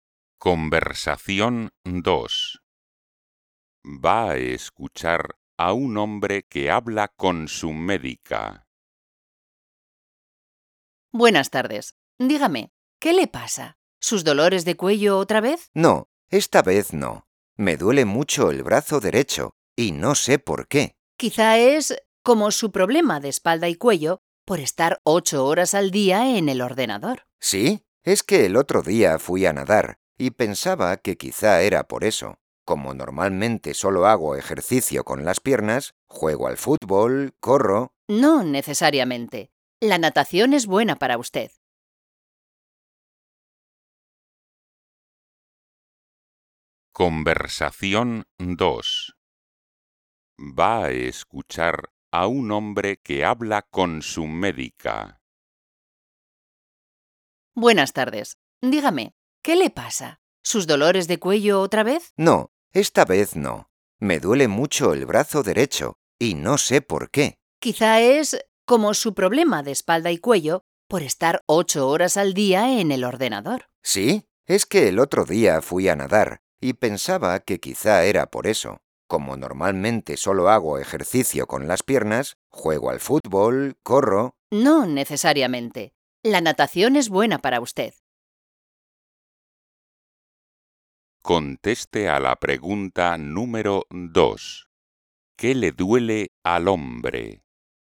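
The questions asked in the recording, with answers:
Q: ¿Qué le duele al hombre?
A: el brazo derecho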